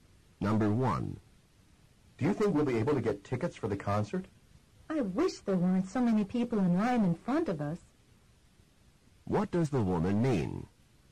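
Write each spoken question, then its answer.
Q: What does the woman mean?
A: There are many people in line in front of them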